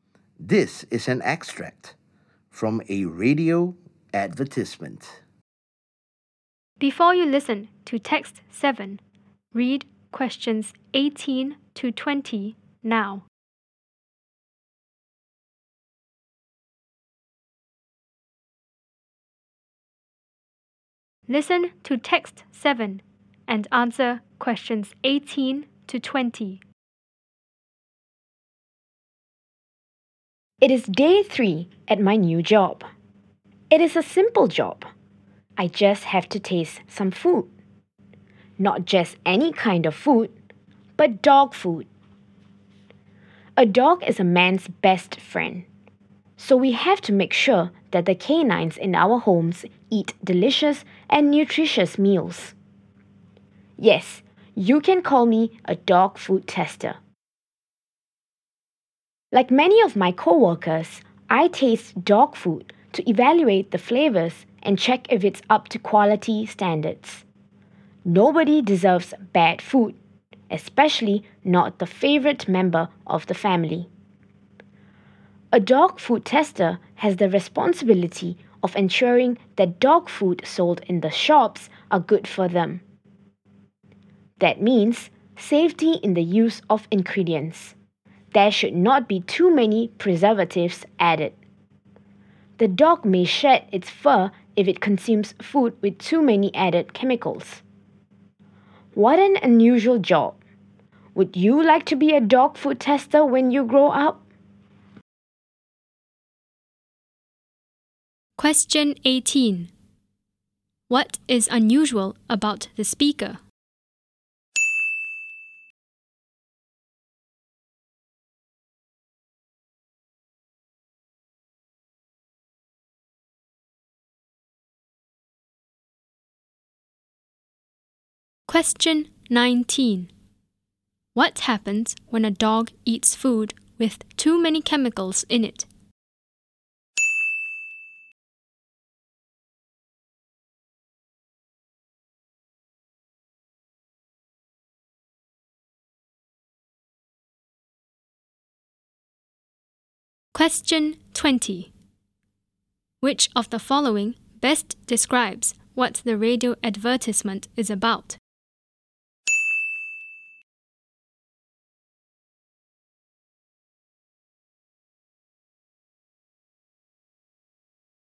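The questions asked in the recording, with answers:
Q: What is unusual about the speaker?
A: He tastes dog food for a living (a dog food tester).

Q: What happens when a dog eats food with too many chemicals in it?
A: It may shed its fur.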